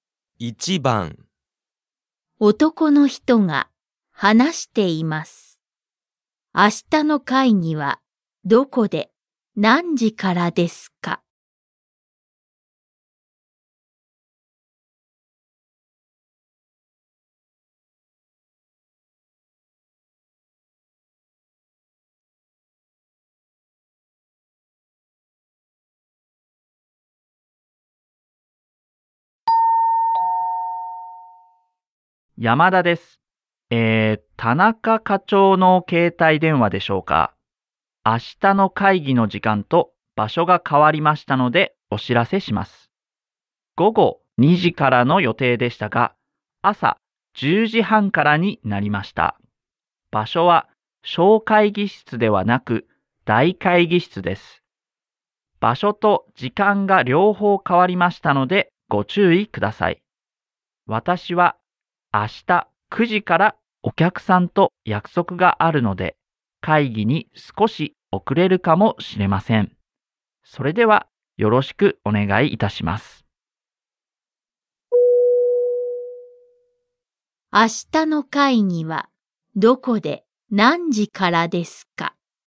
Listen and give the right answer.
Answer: 10時半から大会議室でします。